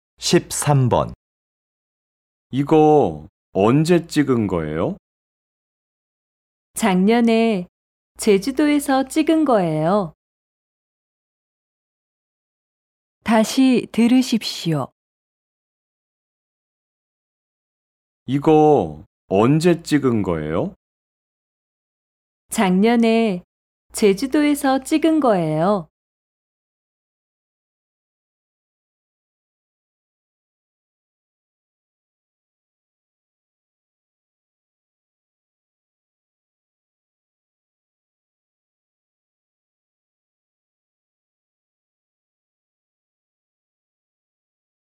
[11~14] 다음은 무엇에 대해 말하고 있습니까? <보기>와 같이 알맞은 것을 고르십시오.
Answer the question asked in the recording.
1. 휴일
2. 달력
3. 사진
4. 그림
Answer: 3. 사진

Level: TOPIK I